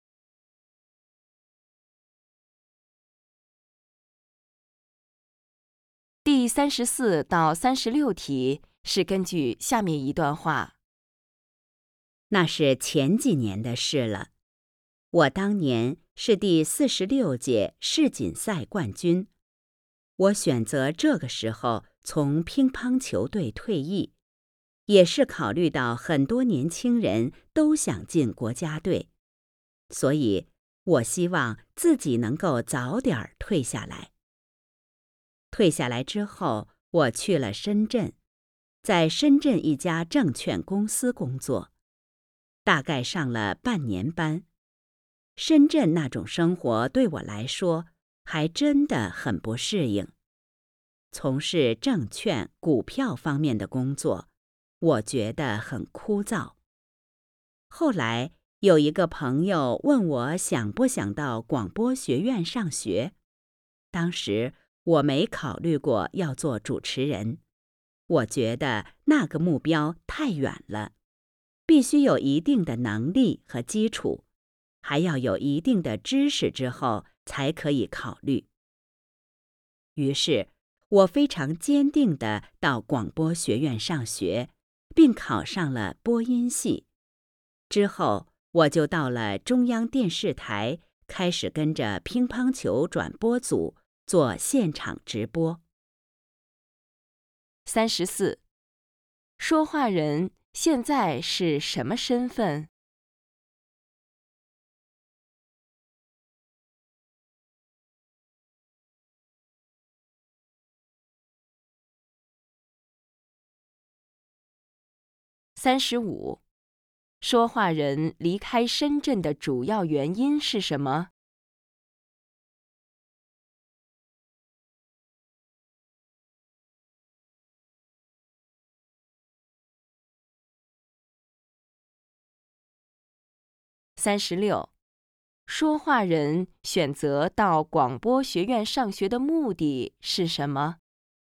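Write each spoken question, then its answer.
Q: 说话人现在是什么身份?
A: 中央电视台(乒乓球转播)主持人

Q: 说话人离开深圳的主要原因是什么?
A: 不适应深圳生活,觉得证券工作枯燥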